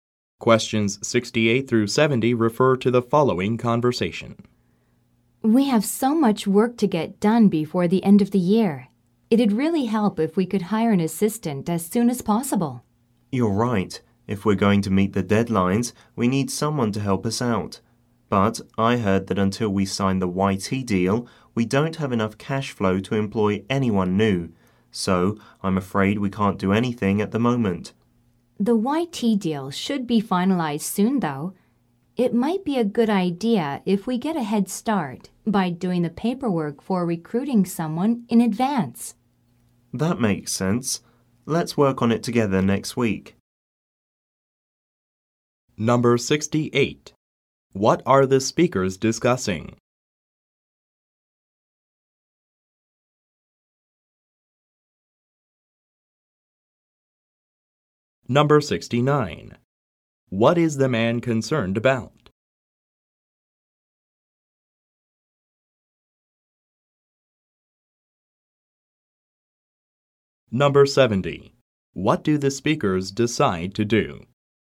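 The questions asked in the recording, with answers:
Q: What are the speakers discussing?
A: Hiring an assistant

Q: What do the speakers decide to do?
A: Do the recruitment paperwork in advance together next week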